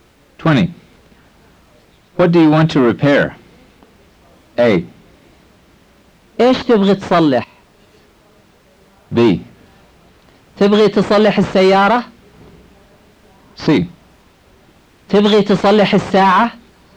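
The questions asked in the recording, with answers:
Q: What do you want to repair?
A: A: ايش تبغي تصلح؟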